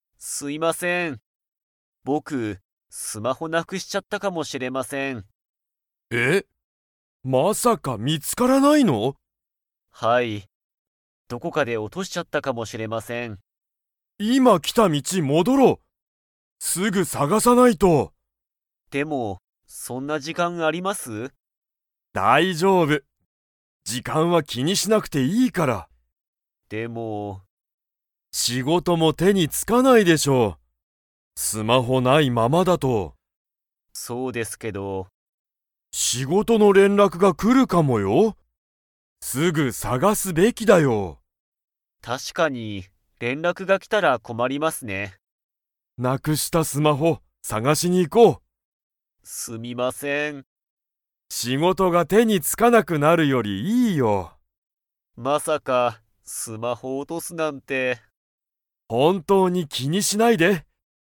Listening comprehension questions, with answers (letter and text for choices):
Comprehension Quiz (Skip if you don't understand the conversation yet)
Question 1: 木村きむらさんの が見みつからない。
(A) 仕事しごと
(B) スマホ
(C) テレビ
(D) 時間じかん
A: (B) スマホ

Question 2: 斉藤さいとうさんは木村きむらさんと一緒いっしょに探さがしに行いきますか?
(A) はい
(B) いいえ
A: (A) はい

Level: Level 4